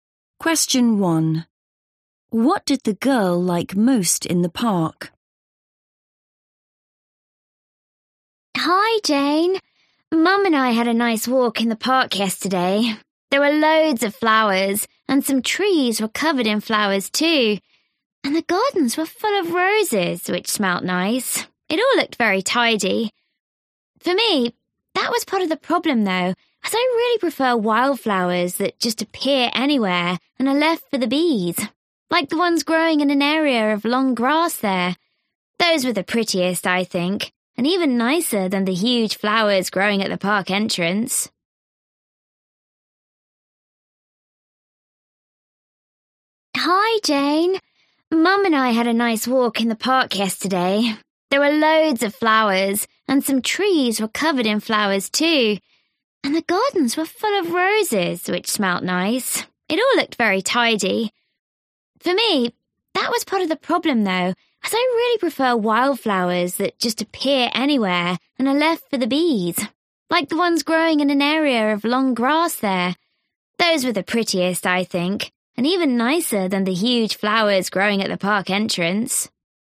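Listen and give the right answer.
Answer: the wildflowers in the long grass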